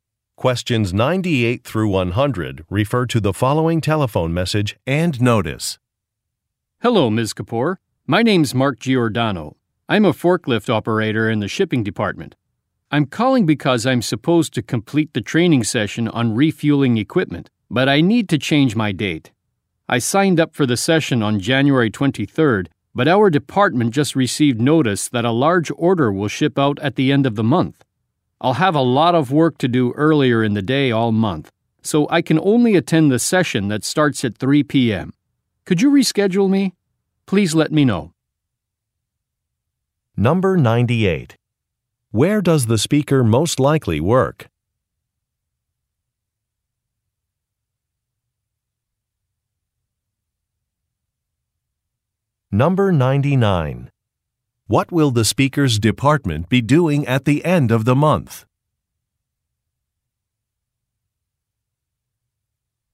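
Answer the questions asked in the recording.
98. In a shipping department (as a forklift operator), probably in a warehouse
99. Shipping out a large order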